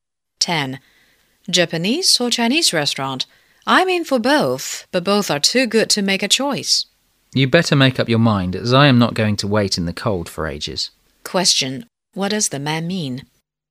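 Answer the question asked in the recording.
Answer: The woman should decide quickly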